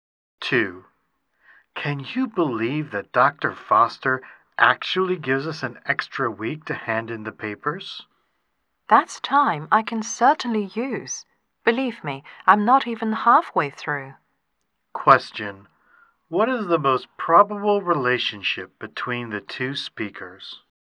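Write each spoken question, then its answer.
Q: What is the most probable relationship between the two speakers?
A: Classmates (students)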